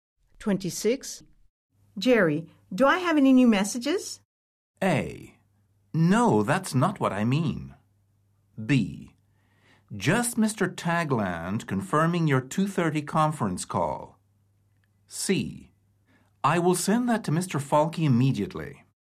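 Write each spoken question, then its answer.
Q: Jerry, do I have any new messages?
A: B: Just Mr. Tagland confirming your 2:30 conference call.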